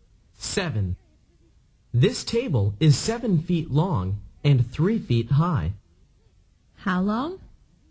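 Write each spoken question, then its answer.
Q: How long?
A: 7 feet long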